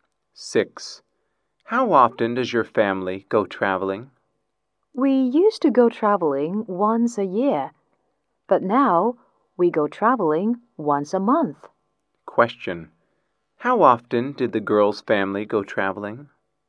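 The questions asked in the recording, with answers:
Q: Question,How often did the girl's family go traveling?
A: Once a year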